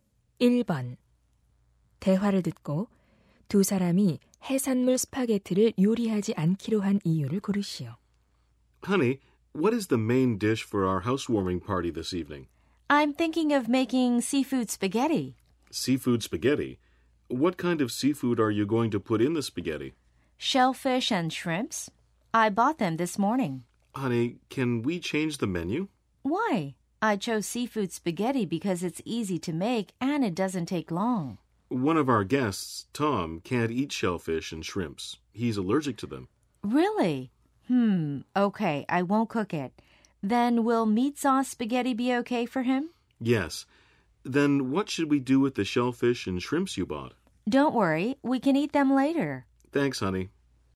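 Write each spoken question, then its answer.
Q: 대화를 듣고 두 사람이 해산물 스파게티를 요리하지 않기로 한 이유를 고르시오.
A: 손님 중 한 명(Tom)이 조개류와 새우에 알레르기가 있어서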